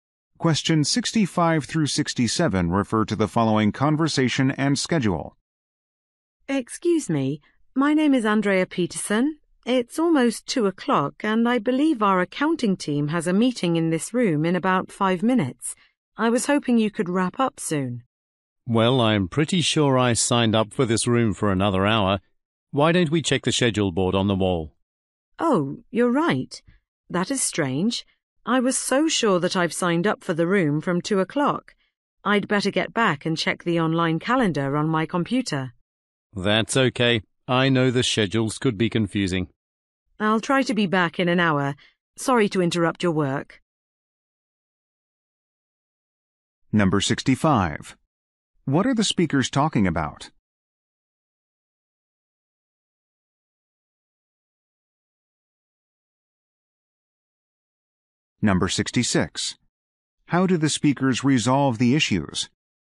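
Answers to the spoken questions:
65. A meeting room booking conflict
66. By checking the schedule board on the wall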